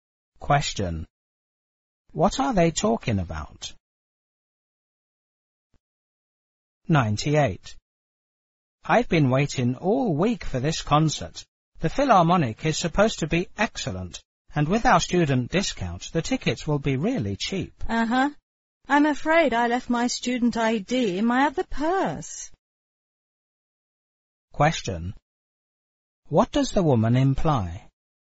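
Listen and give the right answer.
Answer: She can't get the student discount because she doesn't have her student ID.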